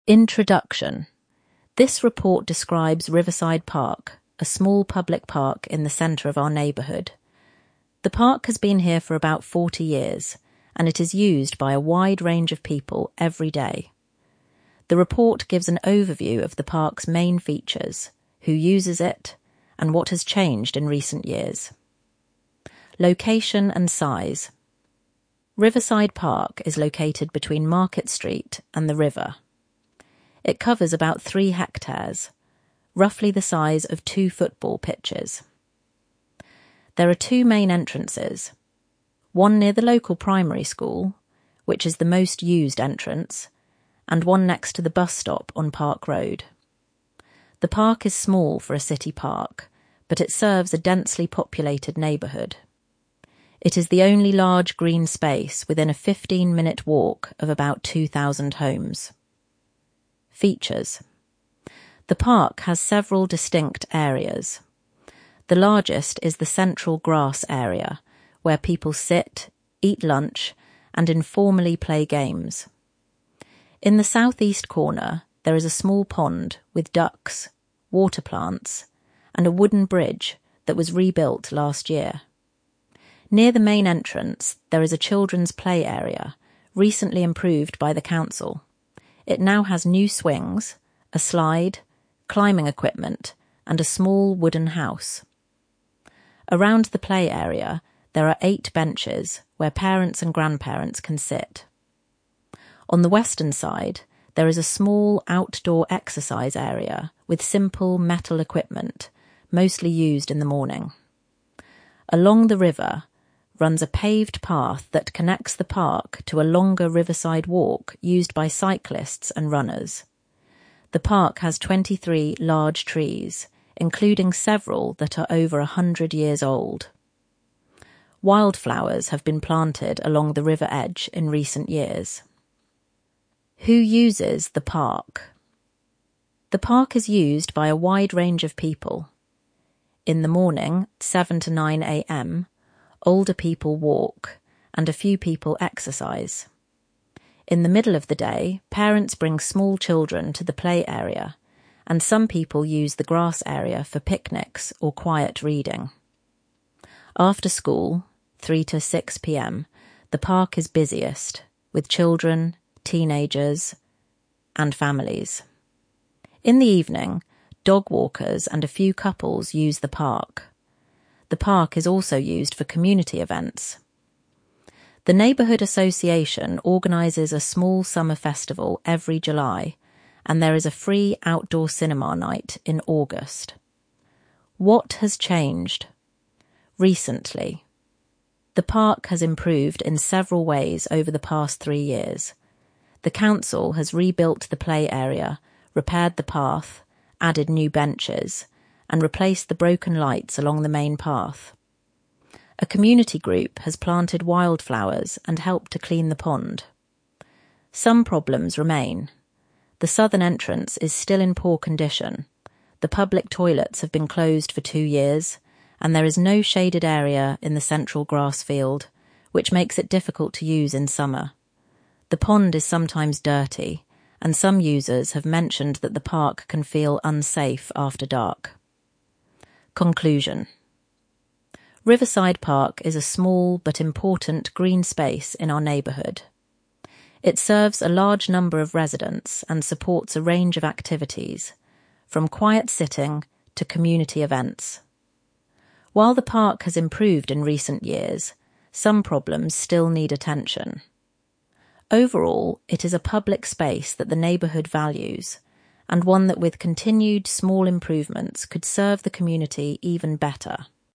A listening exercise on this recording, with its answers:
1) How big is the park?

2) How many homes are within a fifteen-minute walk of the park?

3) What is in the south-east corner of the park?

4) What four things has the council done in recent years?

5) Who uses the park in the morning, and what do they do?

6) When is the park busiest?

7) What community events happen in the park?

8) What four problems does the report mention?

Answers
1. About three hectares — roughly the size of two football pitches.
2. About two thousand.
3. A small pond with ducks, water plants, and a wooden bridge that was rebuilt last year.
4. (1) Rebuilt the play area. (2) Repaired the path. (3) Added new benches. (4) Replaced the broken lights along the main path.
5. Older people walking, and a few people exercising.
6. After school, from 3 to 6 p.m., when children, teenagers, and families use it.
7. A small summer festival every July, organised by the neighbourhood association, and a free outdoor cinema night in August.
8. (1) The southern entrance is still in poor condition. (2) The public toilets have been closed for two years. (3) There is no shaded area in the central grass field. (4) The pond is sometimes dirty, and some users feel the park can be unsafe after dark.

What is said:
INTRODUCTION
This report describes Riverside Park, a small public park in the centre of our neighbourhood. The park has been here for about forty years, and it is used by a wide range of people every day. The report gives an overview of the park's main features, who uses it, and what has changed in recent years.
LOCATION AND SIZE
Riverside Park is located between Market Street and the river. It covers about three hectares — roughly the size of two football pitches. There are two main entrances: one near the local primary school, which is the most-used entrance, and one next to the bus stop on Park Road.
The park is small for a city park, but it serves a densely populated neighbourhood. It is the only large green space within a fifteen-minute walk of about two thousand homes.
FEATURES
The park has several distinct areas. The largest is the central grass area, where people sit, eat lunch, and informally play games. In the south-east corner there is a small pond with ducks, water plants, and a wooden bridge that was rebuilt last year.
Near the main entrance there is a children's play area, recently improved by the council. It now has new swings, a slide, climbing equipment, and a small wooden house. Around the play area there are eight benches where parents and grandparents can sit.
On the western side, there is a small outdoor exercise area with simple metal equipment, mostly used in the morning. Along the river runs a paved path that connects the park to a longer riverside walk used by cyclists and runners.
The park has 23 large trees, including several that are over a hundred years old. Wildflowers have been planted along the river edge in recent years.
WHO USES THE PARK
In the morning (7–9 a.m.), older people walk and a few people exercise. In the middle of the day, parents bring small children to the play area, and some people use the grass area for picnics or quiet reading. After school (3–6 p.m.), the park is busiest, with children, teenagers, and families. In the evening, dog walkers and a few couples use the park.
The park is also used for community events. The neighbourhood association organises a small summer festival every July, and there is a free outdoor cinema night in August.
The park has improved in several ways over the past three years. The council has rebuilt the play area, repaired the path, added new benches, and replaced the broken lights along the main path. A community group has planted wildflowers and helped to clean the pond.
Some problems remain. The southern entrance is still in poor condition, the public toilets have been closed for two years, and there is no shaded area in the central grass field — which makes it difficult to use in summer. The pond is sometimes dirty, and some users have mentioned that the park can feel unsafe after dark.
CONCLUSION
Riverside Park is a small but important green space in our neighbourhood. It serves a large number of residents and supports a range of activities, from quiet sitting to community events. While the park has improved in recent years, some problems still need attention. Overall, it is a public space that the neighbourhood values, and one that with continued small improvements could serve the community even better.